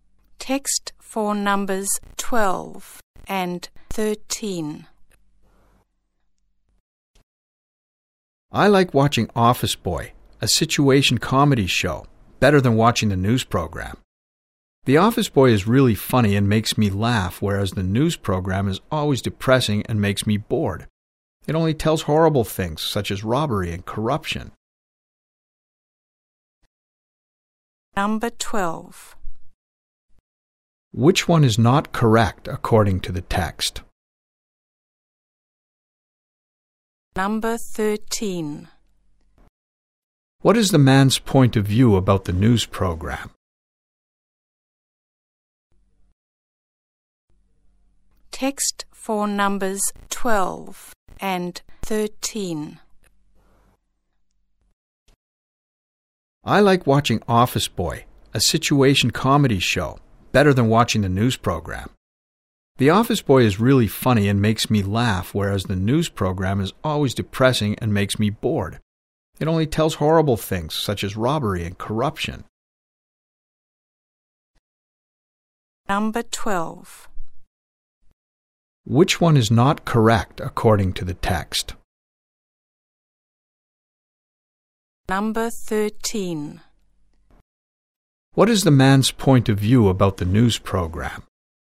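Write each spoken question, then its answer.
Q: What is the man's point of view about the news program?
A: It is depressing and boring because it only tells horrible things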